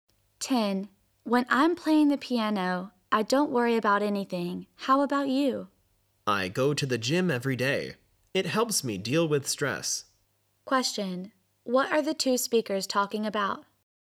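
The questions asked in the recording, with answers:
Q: What are the 2 speakers talking about?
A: Ways to deal with stress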